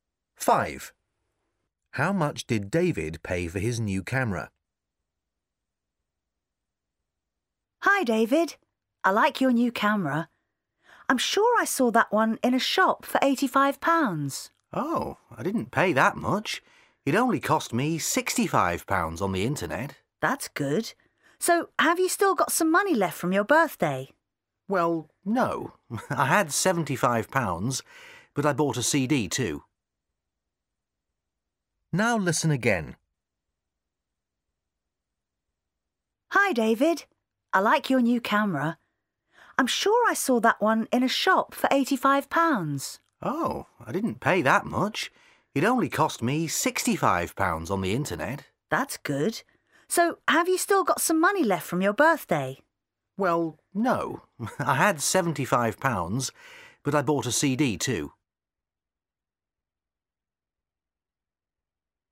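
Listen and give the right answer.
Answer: £65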